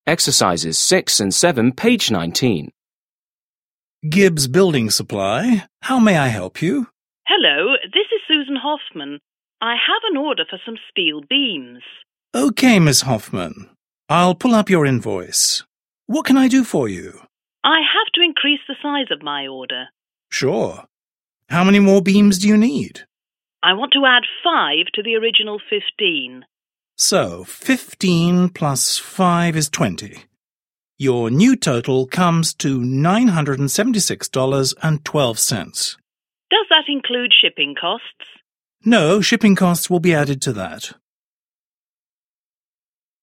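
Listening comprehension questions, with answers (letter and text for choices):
6. Listen to a conversation between a clerk and a construction company manager. Choose the correct answers.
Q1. What is the conversation mainly about?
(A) rounding up a total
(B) adding items to an order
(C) subtracting shipping costs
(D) dividing payments for an order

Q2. What is true of the total?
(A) the woman wants to divide it.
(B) the man added to it incorrectly.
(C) it is lower after subtracting items.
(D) it does not include shipping costs.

7. Listen again and complete the conversation.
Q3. Clerk: Okay, Ms. Hoffman, I'll 1_______your invoice.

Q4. Manager: I have to 2__________of my order.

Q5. Clerk: Sure. 3___________beams do you need?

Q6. Maneger: I want to 4_________to the original fifteen.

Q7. Clerk: So fifteen 5________five is twenty.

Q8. Your new total 6_________$976.12.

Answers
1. (B) adding items to an order
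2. (D) it does not include shipping costs.
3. pull up
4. increase the size
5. How many more
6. add five
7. plus
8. comes to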